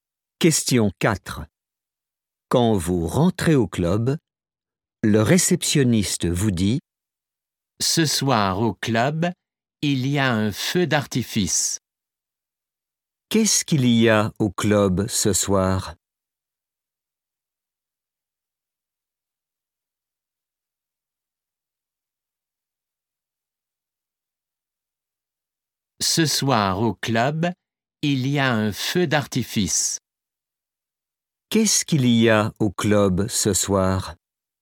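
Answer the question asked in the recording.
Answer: un feu d'artifice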